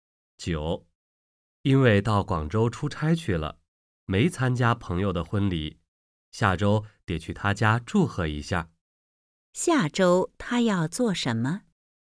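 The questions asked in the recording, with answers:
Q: 下周他要做什么?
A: 去朋友家祝贺他结婚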